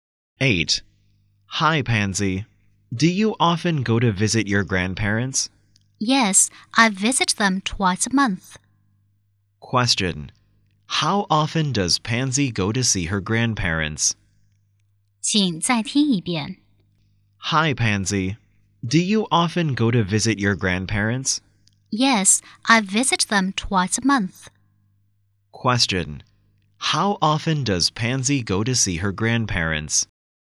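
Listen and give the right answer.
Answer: Twice a month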